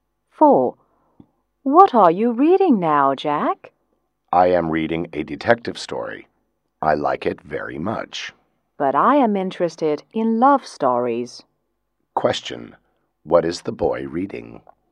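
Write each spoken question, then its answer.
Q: What is the boy reading?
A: A detective story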